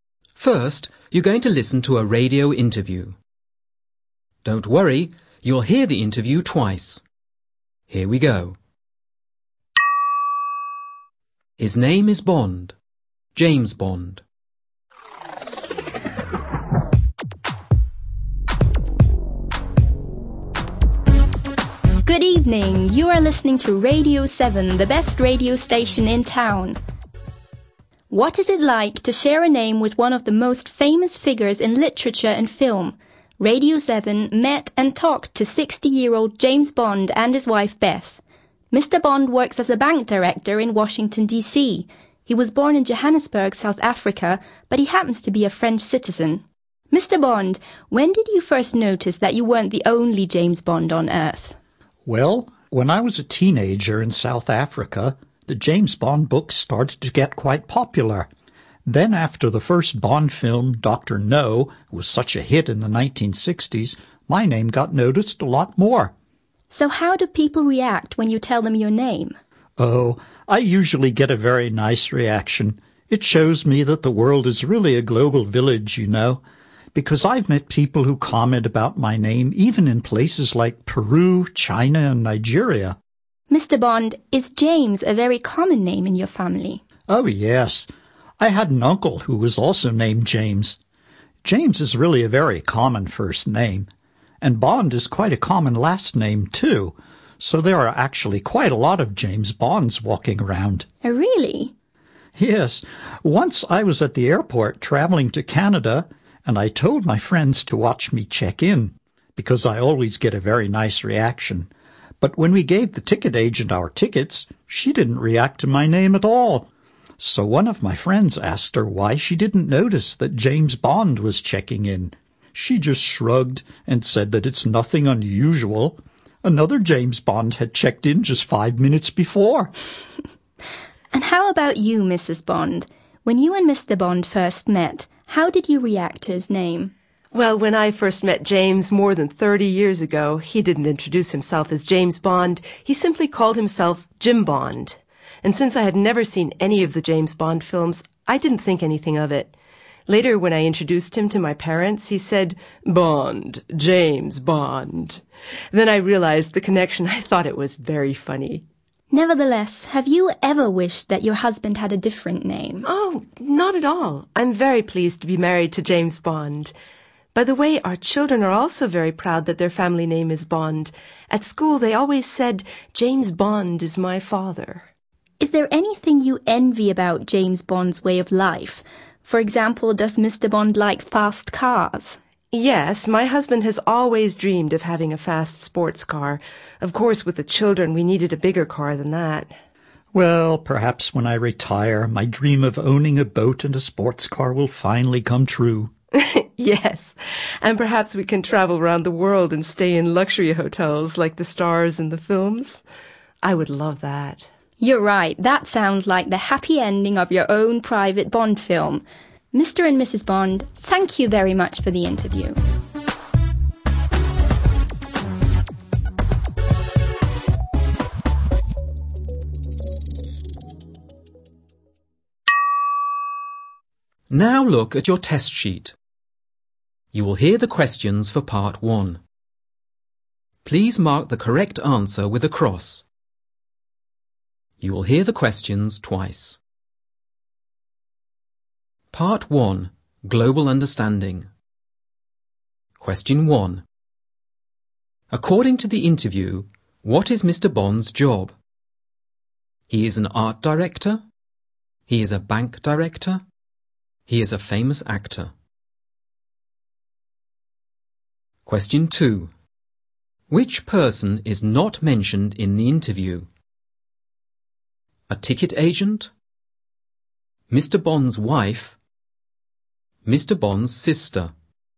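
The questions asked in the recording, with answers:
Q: According to the interview, what is Mr. Bond's job?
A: B: He is a bank director.

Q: Which person is not mentioned in the interview?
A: C: Mr. Bond's sister.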